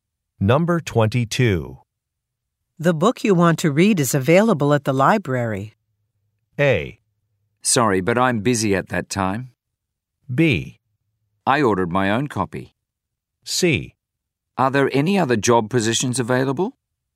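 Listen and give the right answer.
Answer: B: I ordered my own copy.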